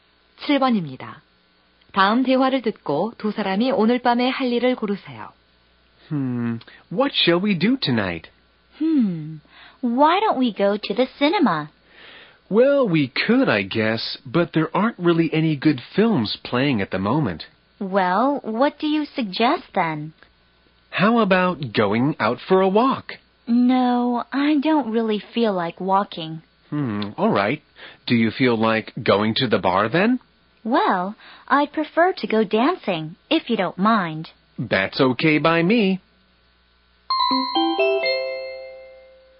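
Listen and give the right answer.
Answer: 춤추러 가기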